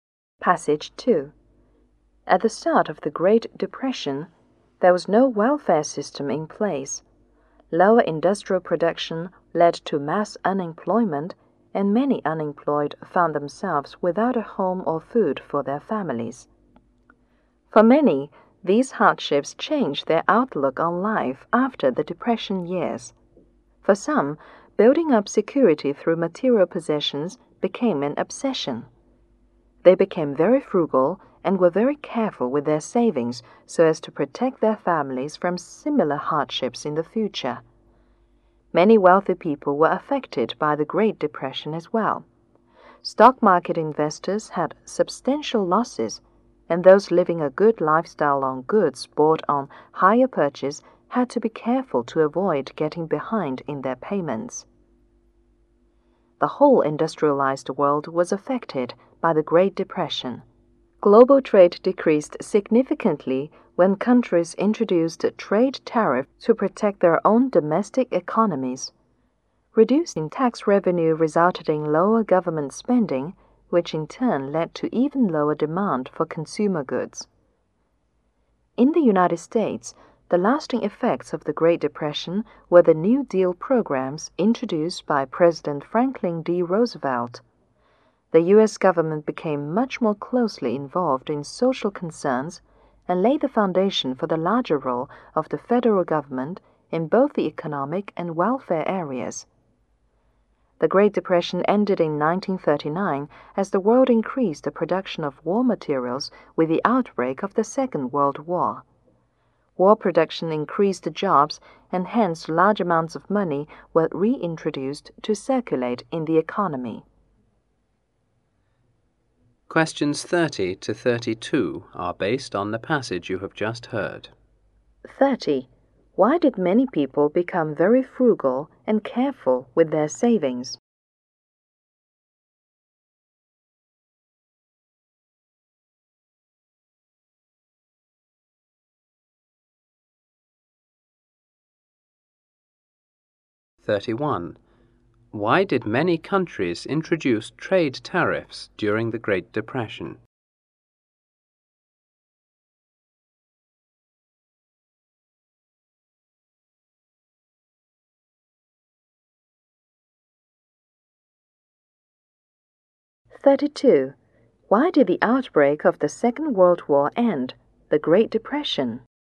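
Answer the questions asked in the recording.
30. To protect their families from similar hardships in the future.
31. To protect their own domestic economies.
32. War production created jobs and put money back into circulation.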